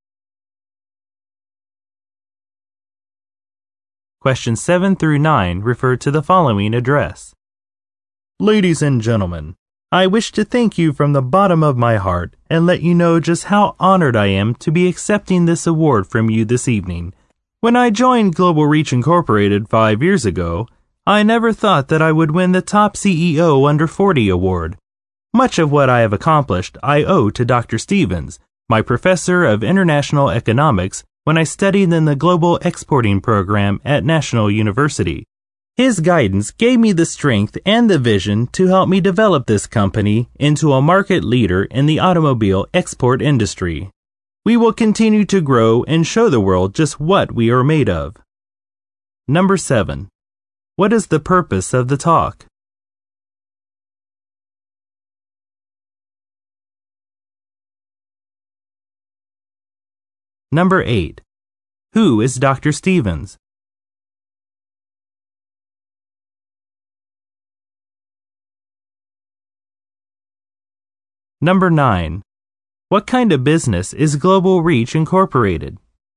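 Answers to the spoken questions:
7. To accept an award
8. The speaker's former professor of international economics
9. Automobile export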